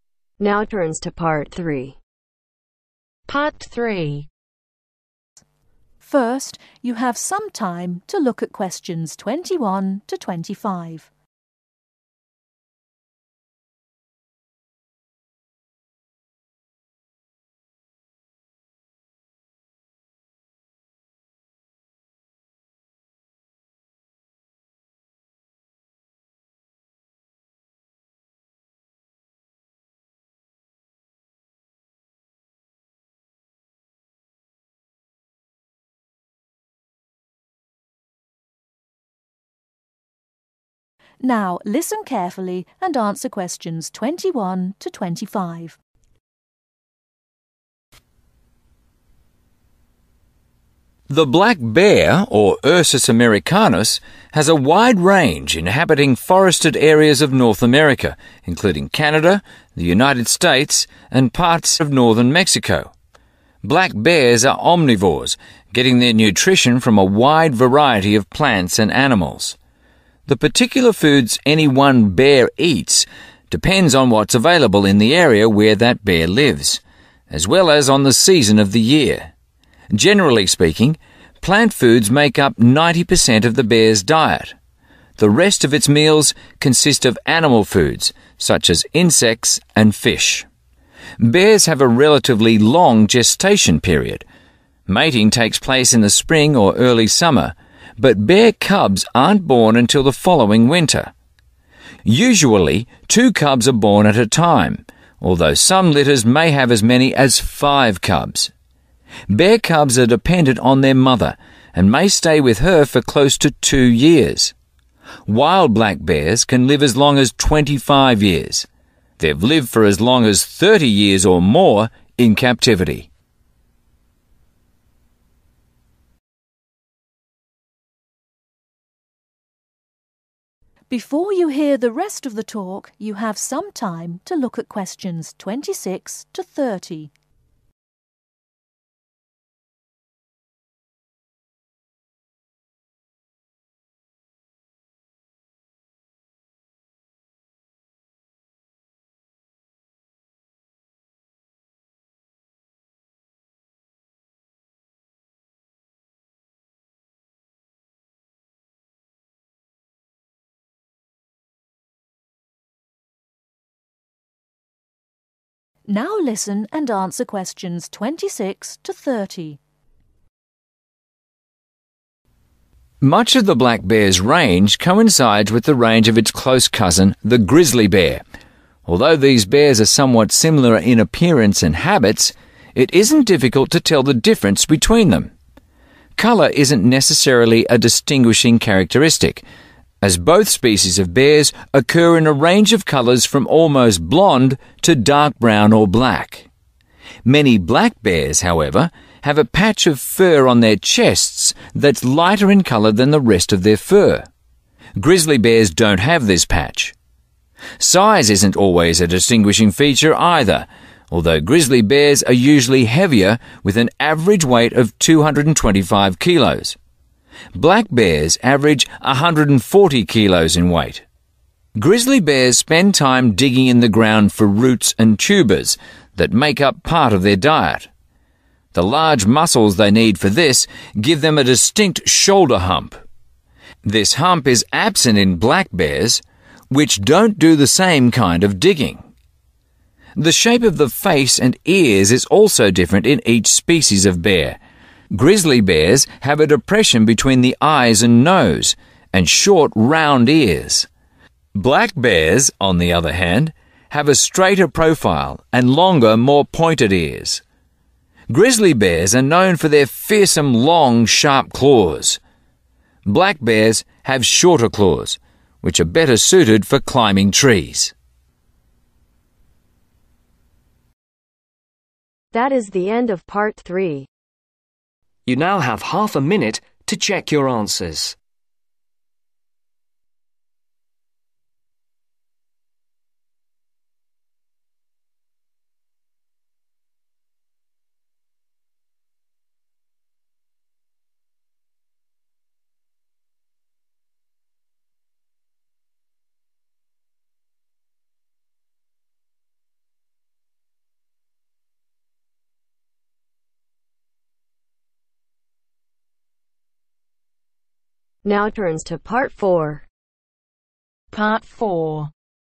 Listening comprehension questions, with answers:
Complete the information below. Write NO MORE THAN TWO WORDS for each answer.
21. Lives in (21)............ of North America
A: Forested area

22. Ninety percent of diet consists of (22)............ also eats (23)............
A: Plant foods

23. Ninety percent of diet consists of (22)............ also eats (23)............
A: Insects/fish

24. Baby bear cubs are born in (24)............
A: The winter

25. Black bears live for about (25)............ Years in the wild.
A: Twenty five